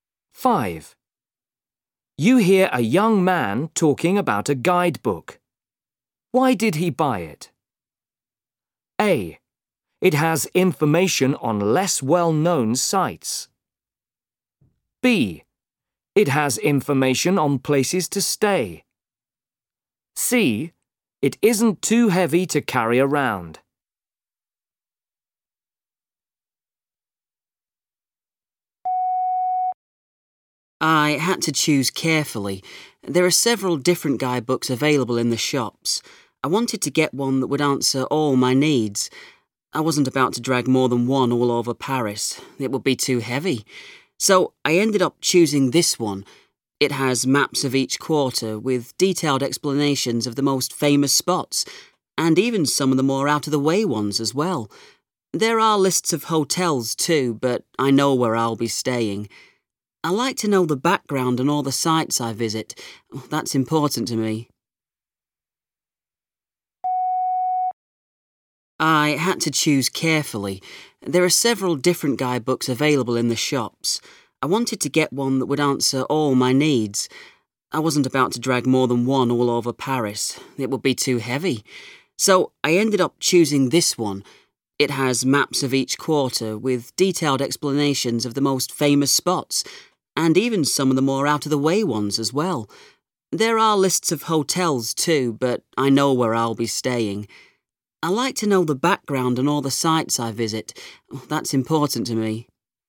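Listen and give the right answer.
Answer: A: It has information on less well-known sites.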